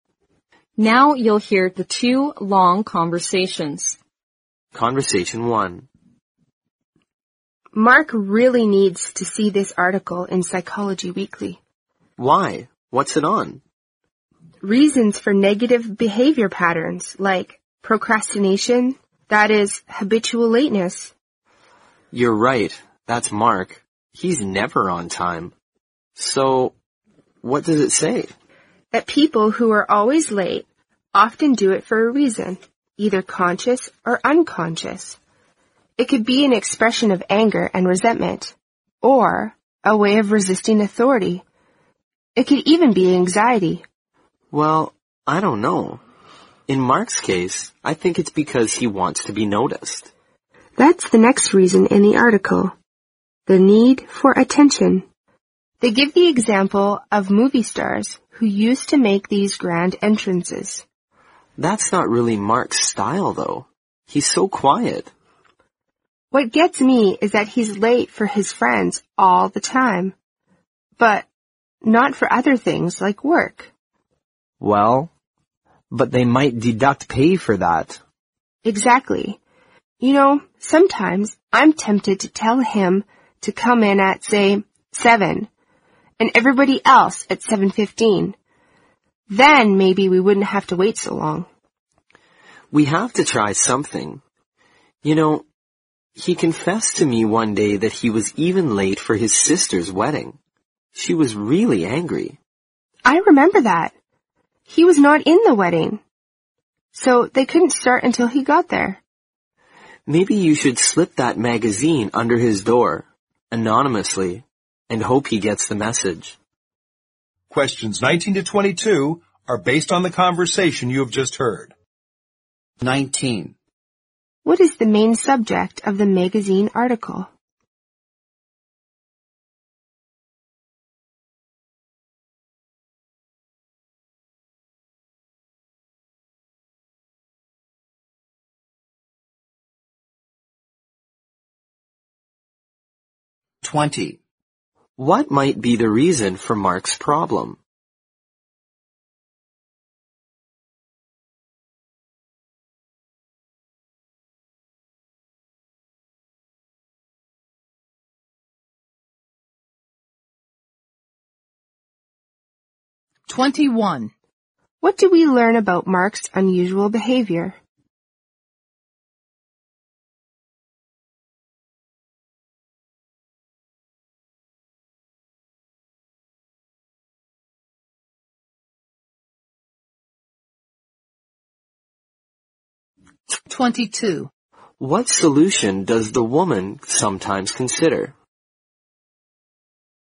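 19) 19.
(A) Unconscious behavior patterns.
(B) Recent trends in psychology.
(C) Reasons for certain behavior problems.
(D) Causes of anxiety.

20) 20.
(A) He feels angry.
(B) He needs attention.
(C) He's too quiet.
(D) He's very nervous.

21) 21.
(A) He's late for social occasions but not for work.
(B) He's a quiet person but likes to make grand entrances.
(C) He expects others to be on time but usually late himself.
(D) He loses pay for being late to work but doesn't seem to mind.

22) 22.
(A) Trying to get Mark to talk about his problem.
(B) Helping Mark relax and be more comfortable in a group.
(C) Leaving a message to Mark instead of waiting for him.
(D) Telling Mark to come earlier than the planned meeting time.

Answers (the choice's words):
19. Reasons for certain behavior problems.
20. He needs attention.
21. He's late for social occasions but not for work.
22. Telling Mark to come earlier than the planned meeting time.

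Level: 新编四级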